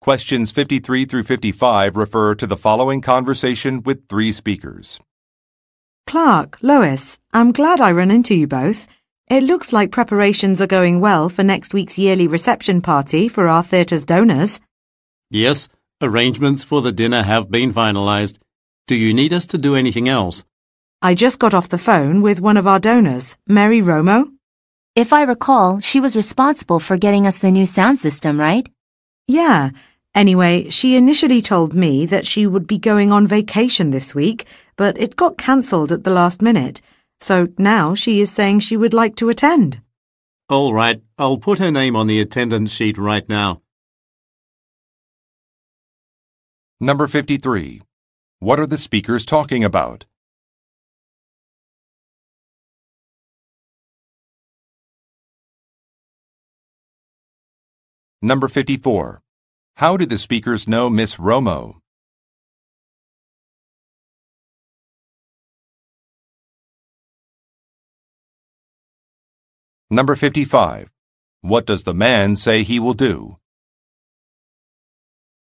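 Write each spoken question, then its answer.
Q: What are the speakers talking about?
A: A yearly reception party for the theatre's donors

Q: How did the speakers know Miss Romo?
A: She paid for the theatre's new sound system

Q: What does the man say he will do?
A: Add her name to the attendance sheet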